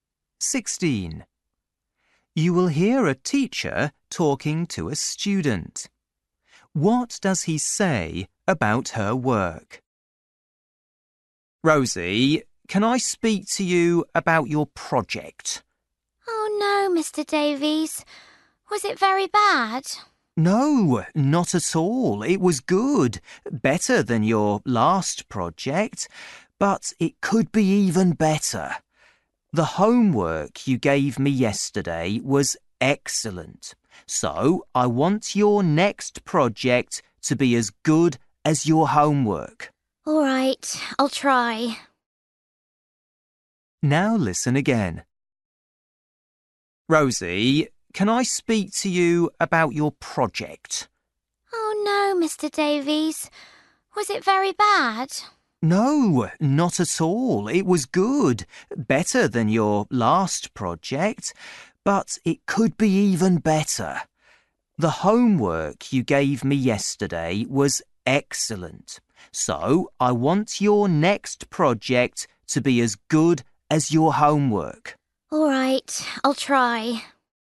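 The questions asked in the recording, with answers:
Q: What does he say about her work?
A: It was good, but it could be better, as good as her homework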